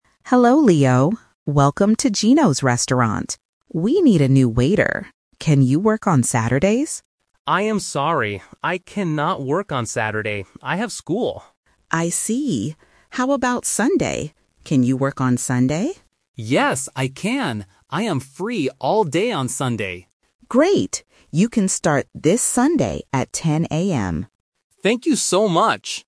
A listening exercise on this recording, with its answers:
Listen to the job interview between a manager and a student. Choose the correct answer (A, B, or C).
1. What job does the restaurant need?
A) A cook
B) A waiter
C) A manager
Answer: B) A waiter

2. Why can't Leo work on Saturday?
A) He is sick.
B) He is tired.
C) He has school.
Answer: C) He has school.

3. What day will Leo work?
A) Friday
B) Saturday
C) Sunday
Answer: C) Sunday

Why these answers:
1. The manager clearly says, "We need a new waiter."
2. Leo says, "I cannot work on Saturday. I have school."
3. The manager asks, "Can you work on Sunday?" and Leo says, "Yes, I can!" The manager then confirms he will start this Sunday.

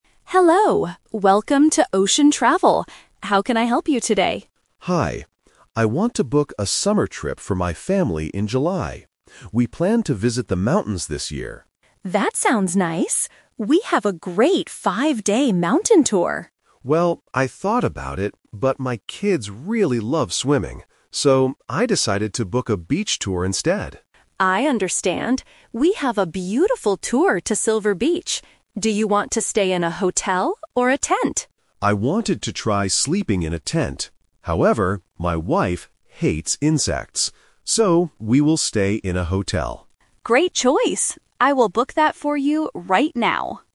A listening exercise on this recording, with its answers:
Listen to the conversation between a customer and a travel agent, and choose the correct answer (A, B, or C) for each question.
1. Where is the family going for their summer trip?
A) To the mountains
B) To the beach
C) To the city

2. Why did the customer choose this place?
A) Because his kids love swimming.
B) Because his wife loves the sun.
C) Because it is very cheap.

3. Where will the family sleep during the trip?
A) In a tent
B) In a hotel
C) In a small boat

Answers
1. B) To the beach
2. A) Because his kids love swimming.
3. B) In a hotel

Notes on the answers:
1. The customer says they planned to visit the mountains (The Trap). However, he uses the word "but" to change his mind. He uses "So" to give his final decision: "I decided to book a beach tour instead." The city is not mentioned.
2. The customer clearly says he chose the beach because "my kids really love swimming." Option B (wife loves the sun) and Option C (very cheap) are plausible reasons to go to the beach, but they are not mentioned in the audio.
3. The customer mentions that he wanted to try sleeping in a tent (The Trap). However, he changes the plan because his wife hates insects. He states his final choice by saying, "So, we will stay in a hotel." A small boat is not mentioned.

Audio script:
Agent: Hello, welcome to Ocean Travel. How can I help you today?
Customer: Hi. I want to book a summer trip for my family in July. We planned to visit the mountains this year.
Agent: That sounds nice! We have a great five-day mountain tour.
Customer: Well, I thought about it, but my kids really love swimming. So, I decided to book a beach tour instead.
Agent: I understand. We have a beautiful tour to Silver Beach. Do you want to stay in a hotel or a tent?
Customer: I wanted to try sleeping in a tent. However, my wife hates insects. So, we will stay in a hotel.

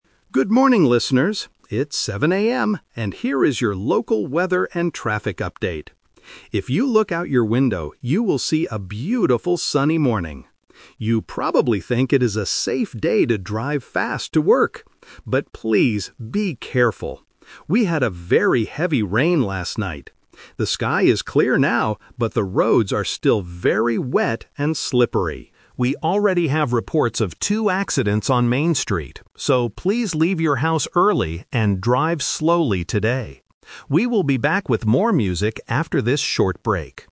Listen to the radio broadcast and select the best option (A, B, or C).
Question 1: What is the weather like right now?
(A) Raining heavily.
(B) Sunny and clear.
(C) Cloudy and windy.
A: (B) Sunny and clear.

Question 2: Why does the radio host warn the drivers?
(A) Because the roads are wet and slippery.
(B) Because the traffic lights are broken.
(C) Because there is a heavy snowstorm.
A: (A) Because the roads are wet and slippery.

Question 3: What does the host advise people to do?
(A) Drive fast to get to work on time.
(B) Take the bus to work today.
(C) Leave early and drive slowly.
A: (C) Leave early and drive slowly.

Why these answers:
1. The host says, "you will see a beautiful, sunny morning" and "The sky is clear now." Option (A) is the trap because it rained heavily last night, not right now. Option (C) is never mentioned.
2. The host explains the danger: "We had a very heavy rain last night... the roads are still very wet and slippery." Option (B) is a plausible traffic problem but is not mentioned. Option (C) is a trap because "heavy rain" is mentioned, not a "snowstorm".
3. At the end of the update, the host clearly says: "So, please leave your house early and drive slowly today." Option (A) is the trap because the host says, "You probably think it is a safe day to drive fast... But please, be careful!" (rejecting the idea). Option (B) is not mentioned.

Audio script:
Radio Host: Good morning, listeners! It's 7:00 AM and here is your local weather and traffic update. If you look out your window, you will see a beautiful, sunny morning. You probably think it is a safe day to drive fast to work. But please, be careful! We had a very heavy rain last night. The sky is clear now, but the roads are still very wet and slippery. We already have reports of two accidents on Main Street. So, please leave your house early and drive slowly today. We will be back with more music after this short break.

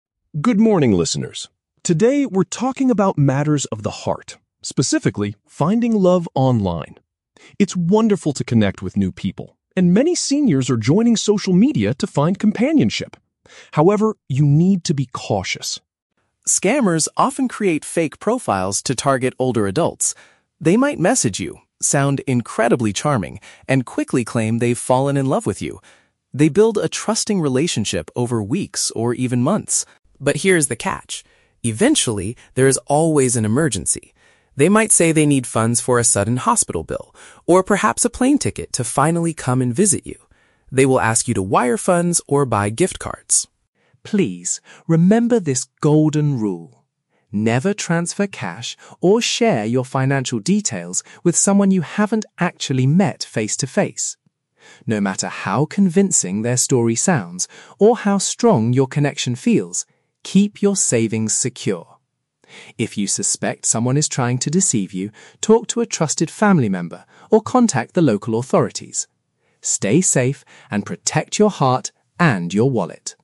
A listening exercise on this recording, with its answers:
Read the questions below. Then, read or listen to the radio announcement and choose the best answer (A, B, or C) for each question.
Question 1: What is the main warning given in this announcement?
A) Older adults should completely avoid using social media.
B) People should watch out for criminals pretending to look for love.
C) You should never share your photographs with strangers online.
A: B) People should watch out for criminals pretending to look for love.

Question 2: What is one common excuse these online criminals use to ask for cash?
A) They offer to buy you a plane ticket to visit them.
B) They ask for funds to start a new company.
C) They state they need help paying for a sudden health issue.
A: C) They state they need help paying for a sudden health issue.

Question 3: What does the speaker strongly advise listeners to do?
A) Refuse to send money to anyone they only know from the internet.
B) Delete their social media accounts if someone asks them for money.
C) Give financial help only by using secure gift cards.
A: A) Refuse to send money to anyone they only know from the internet.

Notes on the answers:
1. The speaker talks about "scammers" who create "fake profiles" and "claim they've fallen in love with you." Option (A) is a trap; the speaker actually says it is "wonderful to connect with new people," so they do not tell you to avoid social media entirely. Option (C) is plausible for internet safety, but it is never mentioned in the audio.
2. The script mentions that scammers ask for funds for a "sudden hospital bill," which means a health issue. Option (A) is a trap; the scammers ask you to buy a plane ticket for them, they do not offer to buy one for you. Option (B) is not mentioned in the text at all.
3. The speaker explicitly gives the golden rule: "never transfer cash... with someone you haven't actually met face-to-face." Option (C) is a trap; scammers often ask to be paid with gift cards, but the speaker does not advise you to use them. Option (B) is a logical action, but the speaker never tells listeners to delete their accounts.

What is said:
Announcer: "Good morning, listeners. Today, we're talking about matters of the heart, specifically, finding love online. It's wonderful to connect with new people, and many seniors are joining social media to find companionship. However, you need to be cautious.
Scammers often create fake profiles to target older adults. They might message you, sound incredibly charming, and quickly claim they've fallen in love with you. They build a trusting relationship over weeks or even months.
But here is the catch: eventually, there is always an emergency. They might say they need funds for a sudden hospital bill, or perhaps a plane ticket to finally come and visit you. They will ask you to wire funds or buy gift cards.
Please, remember this golden rule: never transfer cash or share your financial details with someone you haven't actually met face-to-face. No matter how convincing their story sounds, or how strong your connection feels, keep your savings secure. If you suspect someone is trying to deceive you, talk to a trusted family member or contact the local authorities. Stay safe, and protect your heart and your wallet."

